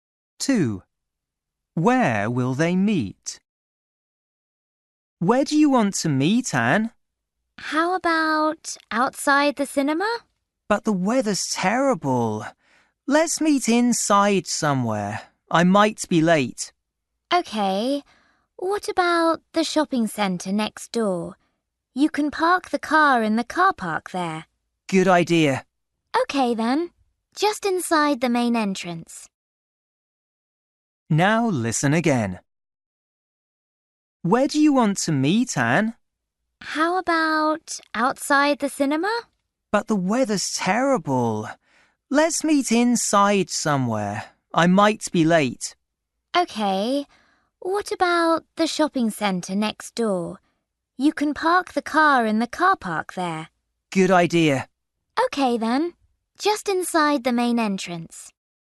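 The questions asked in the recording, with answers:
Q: Where will they meet?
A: Just inside the main entrance of the shopping centre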